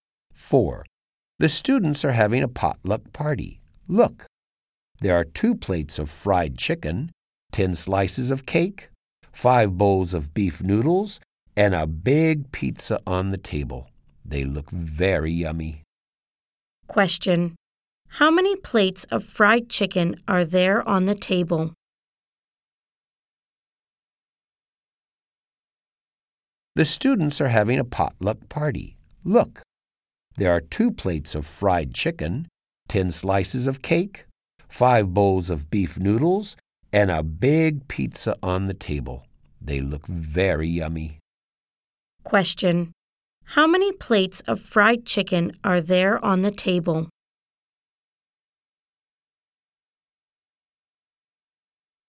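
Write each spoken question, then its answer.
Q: How many plates of fried chicken are there on the table?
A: Two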